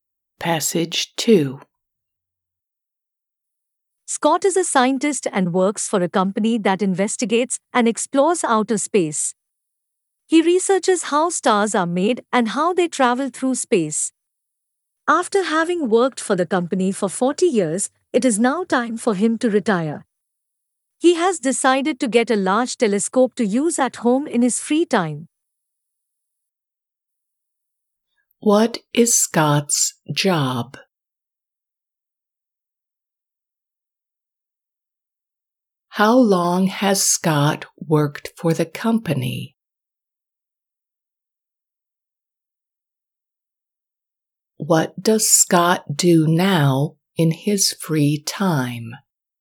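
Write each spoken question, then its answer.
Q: What is Scott's job?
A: A scientist

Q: How long has Scott worked for the company?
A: 40 years

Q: What does Scott do now in his free time?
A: Uses a large telescope at home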